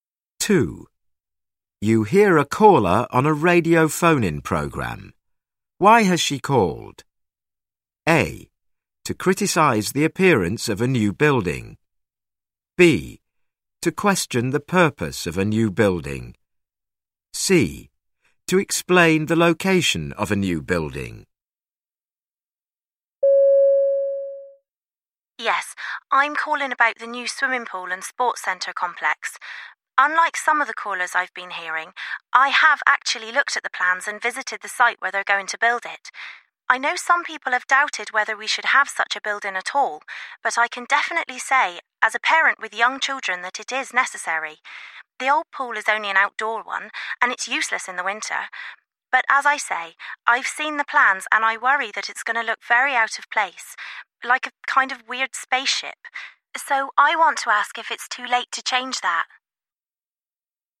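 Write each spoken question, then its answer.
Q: Why has she called?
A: A: To criticise the appearance of a new building.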